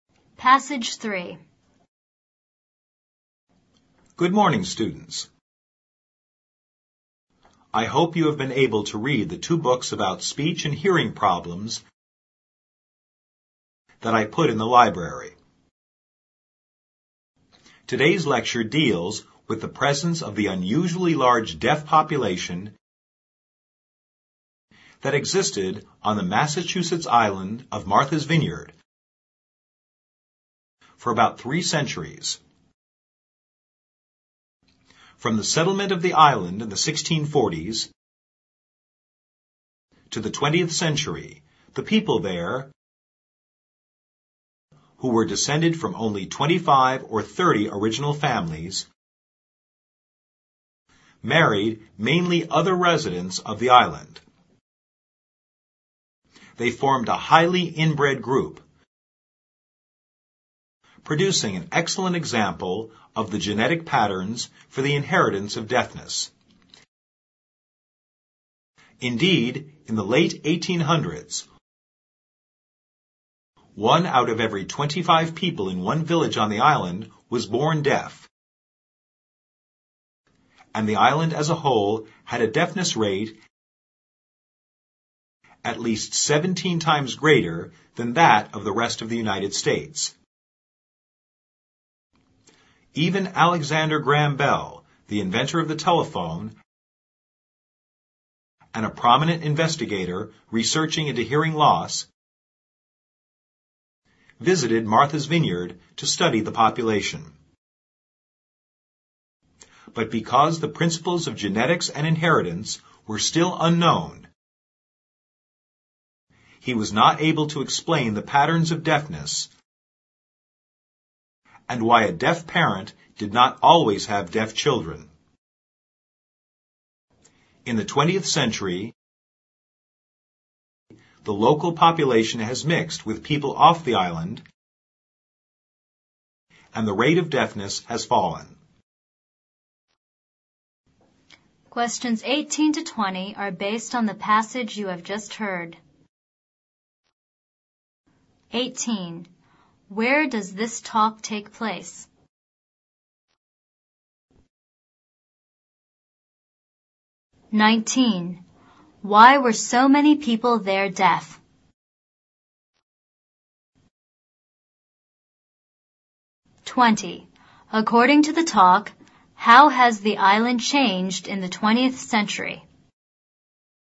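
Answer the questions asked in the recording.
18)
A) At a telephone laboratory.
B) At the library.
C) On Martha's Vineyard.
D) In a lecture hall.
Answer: D) In a lecture hall.
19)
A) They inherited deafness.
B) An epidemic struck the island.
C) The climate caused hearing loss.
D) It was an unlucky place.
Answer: A) They inherited deafness.
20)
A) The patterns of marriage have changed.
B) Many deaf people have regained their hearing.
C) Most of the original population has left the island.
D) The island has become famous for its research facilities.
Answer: A) The patterns of marriage have changed.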